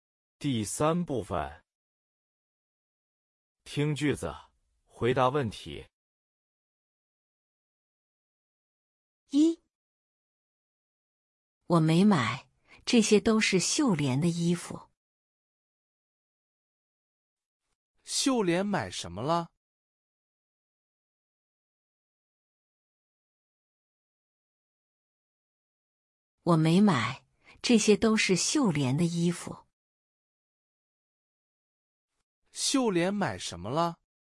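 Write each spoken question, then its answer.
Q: 秀莲买什么了?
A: 衣服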